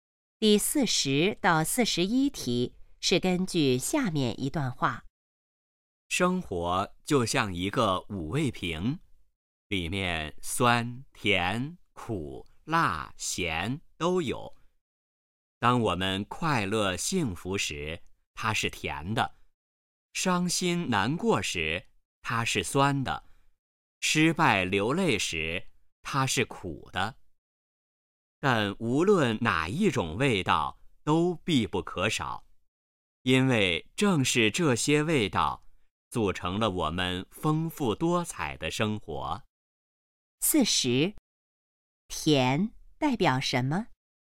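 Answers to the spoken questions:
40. 快乐幸福
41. 生活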